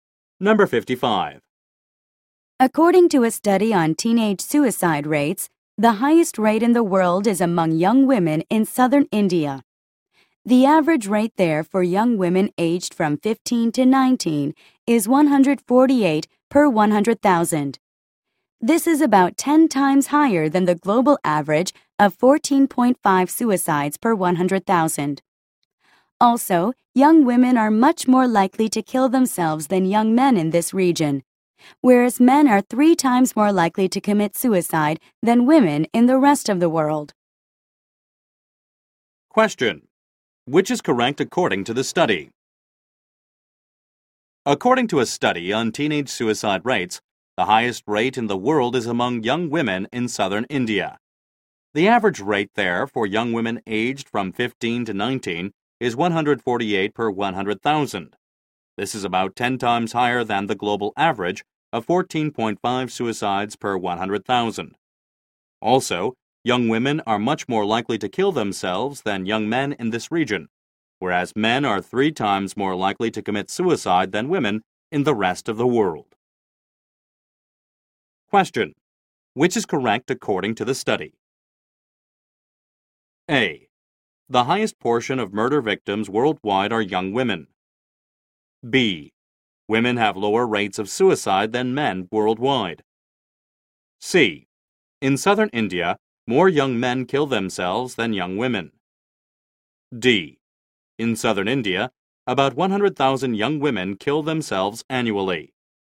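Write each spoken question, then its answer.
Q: Which is correct according to the study?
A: B: Women have lower rates of suicide than men worldwide.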